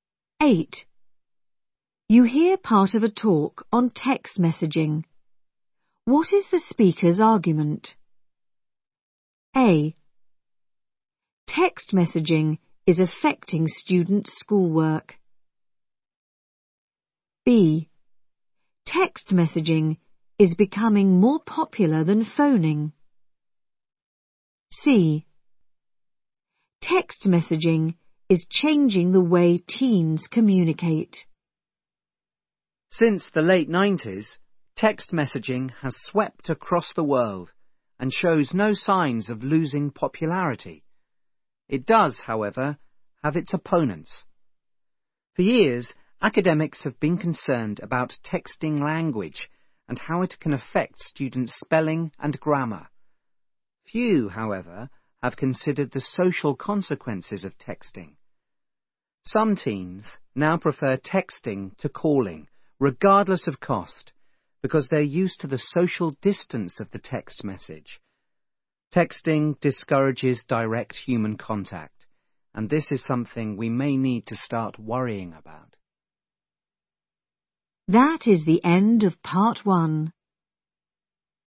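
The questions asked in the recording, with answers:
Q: What is the speaker's argument?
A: C: Text messaging is changing the way teens communicate.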